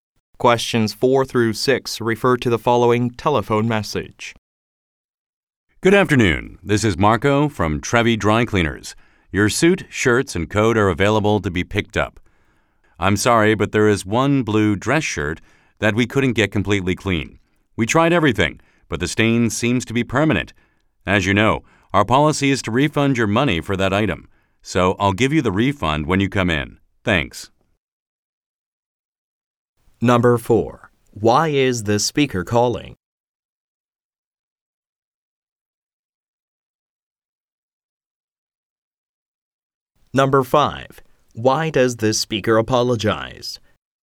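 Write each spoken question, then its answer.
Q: Why is the speaker calling?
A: To say the customer's clothes are ready to be picked up

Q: Why does the speaker apologize?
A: A shirt could not be cleaned completely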